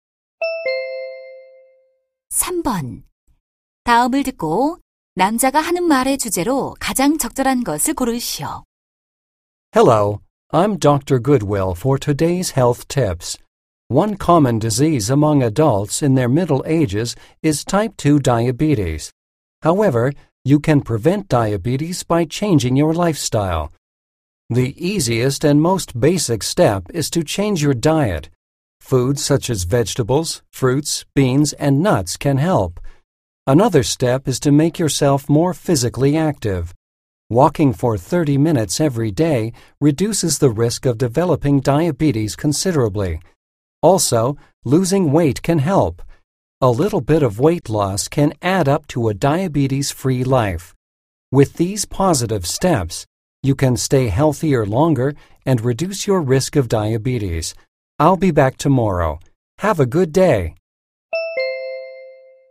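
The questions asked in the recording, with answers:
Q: 다음을 듣고 남자가 하는 말의 주제로 가장 적절한 것을 고르시오.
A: 생활 습관 변화를 통한 당뇨병 예방법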